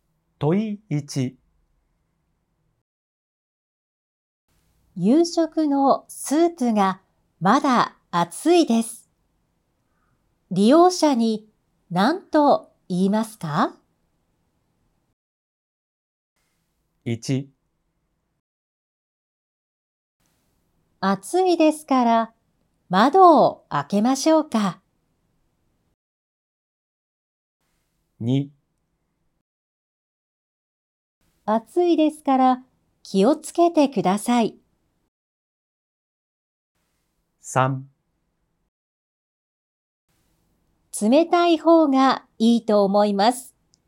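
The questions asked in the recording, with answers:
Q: 夕食のスープがまだ熱いです。利用者に何と言いますか?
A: 2: 暑いですから気をつけてください。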